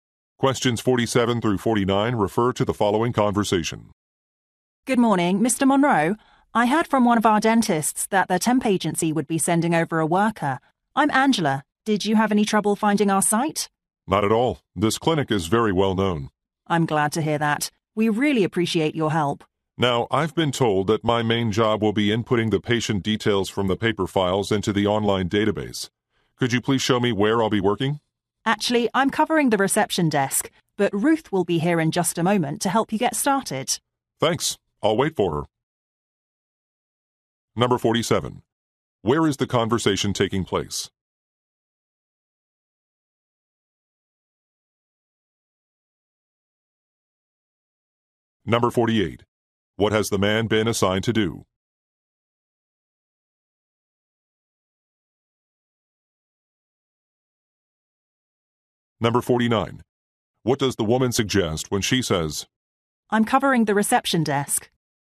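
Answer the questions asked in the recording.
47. At a dental clinic
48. Input patient details from paper files into an online database
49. She cannot show him herself; Ruth will help him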